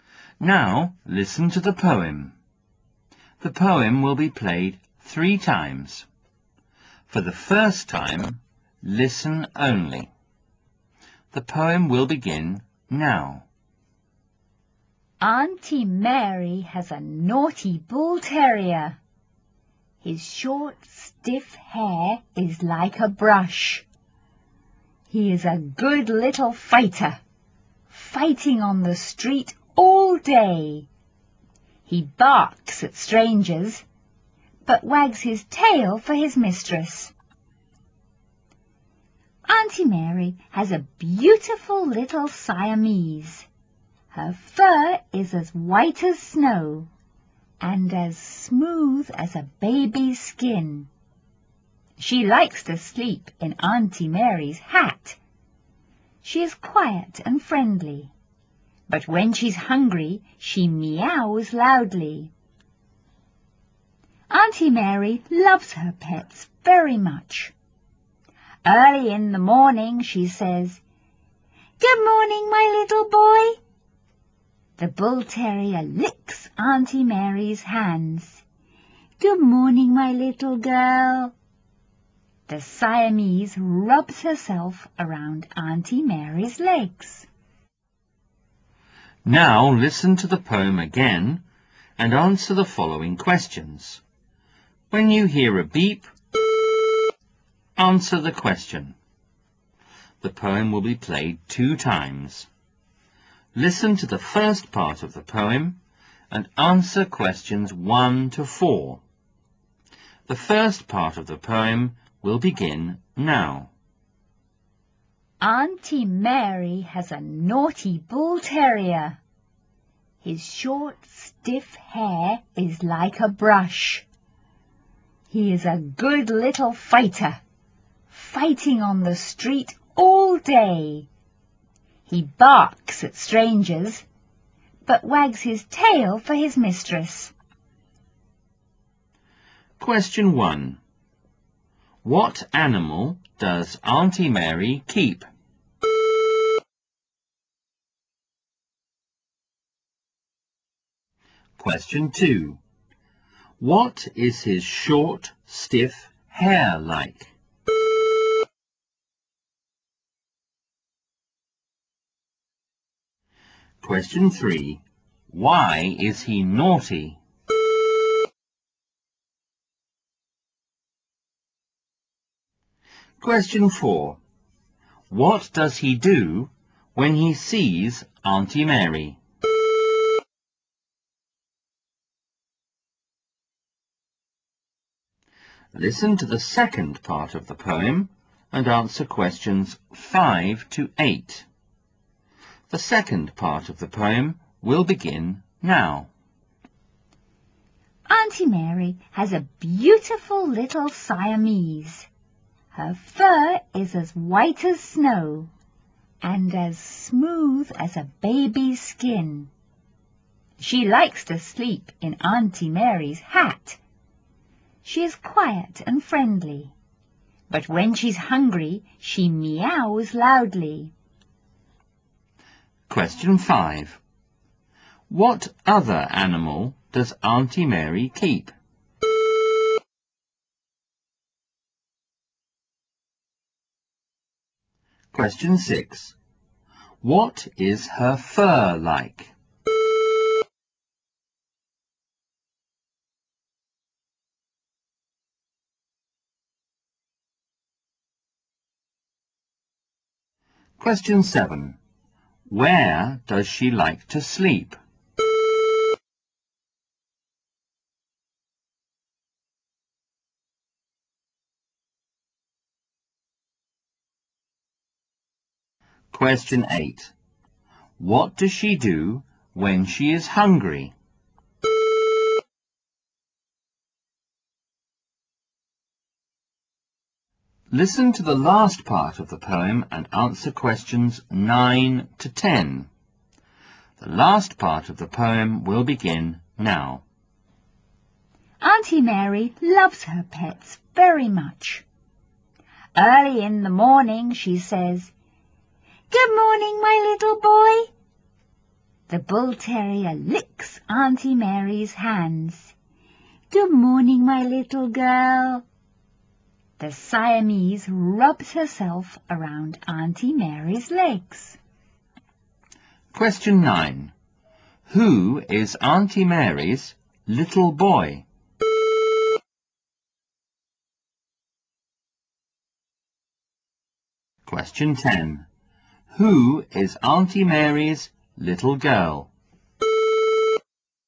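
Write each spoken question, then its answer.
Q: What animal does Auntie Mary keep?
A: A bull terrier.

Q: What is his short, stiff hair like?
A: Like a brush.

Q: Why is he naughty?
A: He fights on the street all day.

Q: What does he do when he sees Auntie Mary?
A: He wags his tail.

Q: What other animal does Auntie Mary keep?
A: A Siamese cat.

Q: What is her fur like?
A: As white as snow and as smooth as a baby's skin.

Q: Where does she like to sleep?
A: In Auntie Mary's hat.

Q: What does she do when she is hungry?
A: She meows loudly.

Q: Who is Auntie Mary's little boy?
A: The bull terrier.

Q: Who is Auntie Mary's little girl?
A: The Siamese cat.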